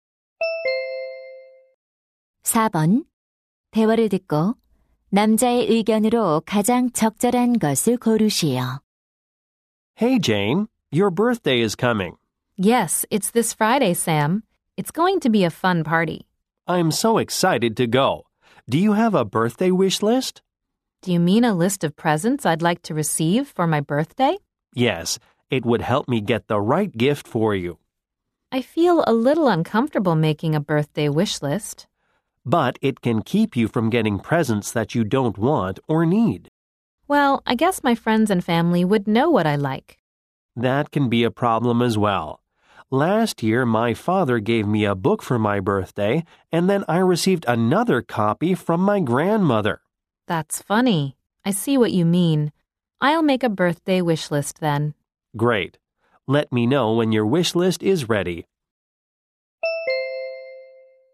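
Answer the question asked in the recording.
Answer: 생일 선물 희망 목록을 만드는 것이 도움이 된다.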